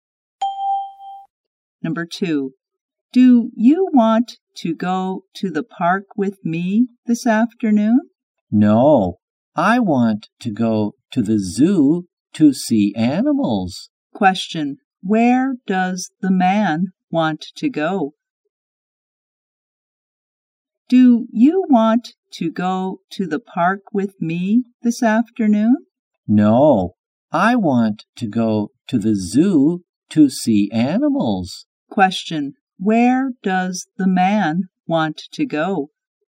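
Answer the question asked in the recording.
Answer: To the zoo.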